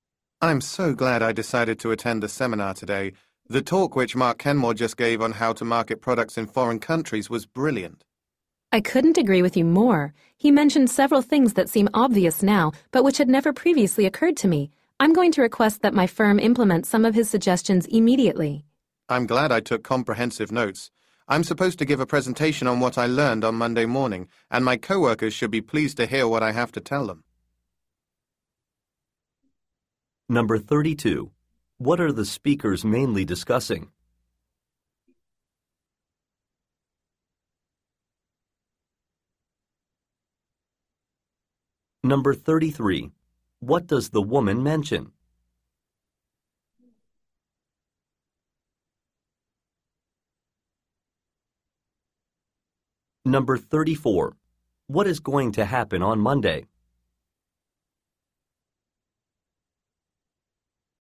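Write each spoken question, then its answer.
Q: What are the speakers mainly discussing?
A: A talk on marketing products in foreign countries given at a seminar

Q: What is going to happen on Monday?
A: One speaker will give a presentation to co-workers on what was learned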